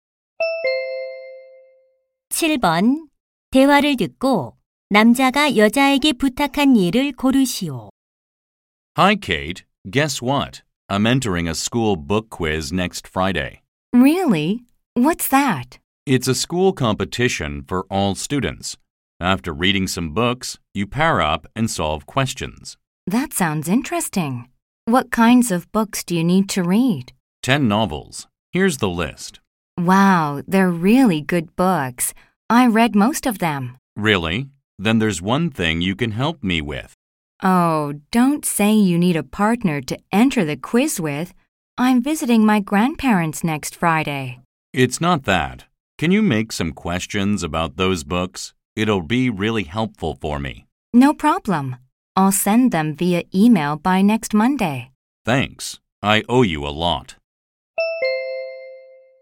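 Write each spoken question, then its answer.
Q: 대화를 듣고 남자가 여자에게 부탁한 일을 고르시오.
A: 독서 퀴즈 도서에 관한 문제 만들어 주기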